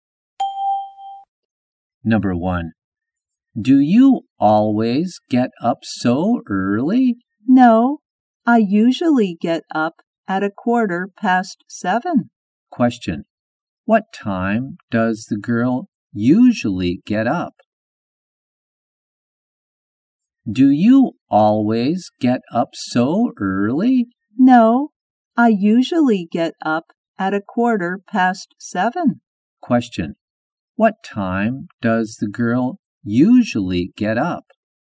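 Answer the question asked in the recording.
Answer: At 7:15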